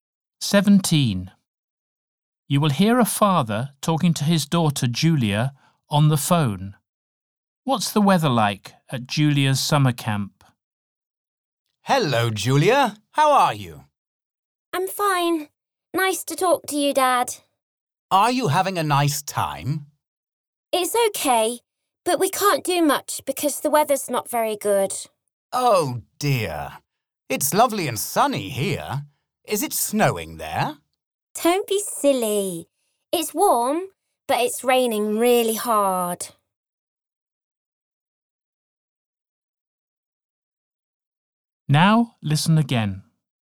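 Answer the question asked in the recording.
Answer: Warm and raining hard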